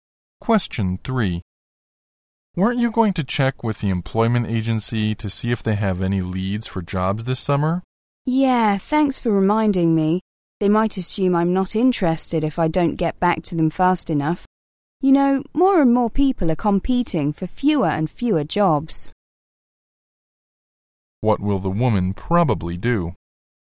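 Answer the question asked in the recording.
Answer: Contact the employment agency soon.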